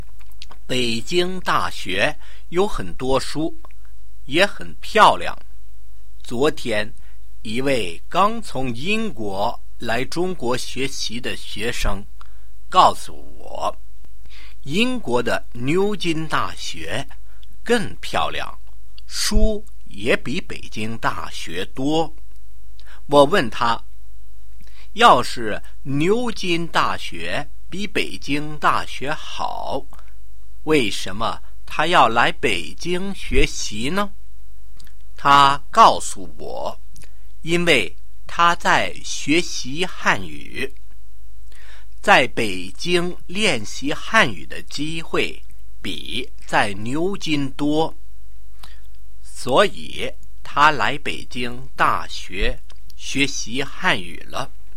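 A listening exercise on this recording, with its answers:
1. Describe Peking University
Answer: It has many books and is very beautiful.

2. What did the English student told me yesterday?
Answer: That Oxford University is more beautiful and has more books than Peking University.

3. Why does he wants to study at Peking University?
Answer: He is studying Chinese, and there are more chances to practise Chinese in Beijing than in Oxford.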